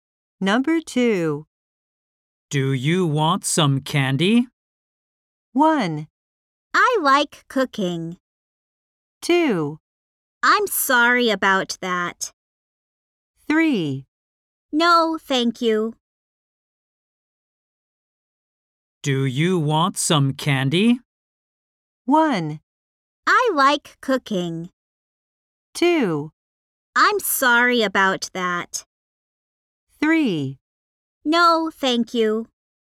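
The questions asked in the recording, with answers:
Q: Do you want some candy?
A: 3: No, thank you.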